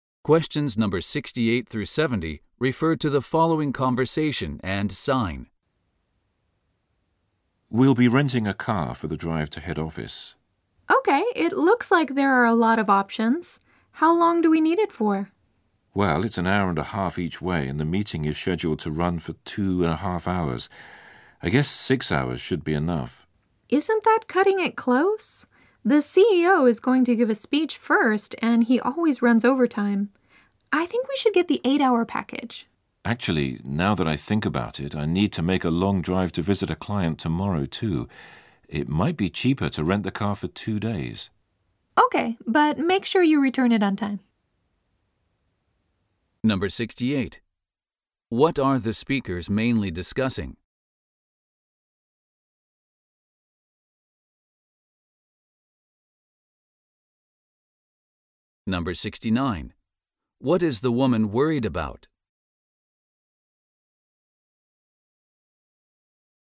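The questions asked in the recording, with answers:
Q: What are the speakers mainly discussing?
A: Renting a car for the drive to head office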